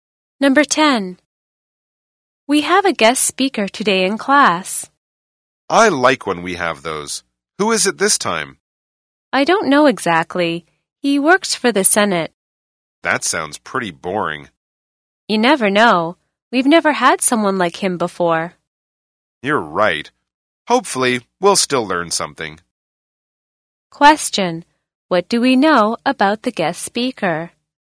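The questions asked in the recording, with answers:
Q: What do we know about the guest speaker?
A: He works for the Senate.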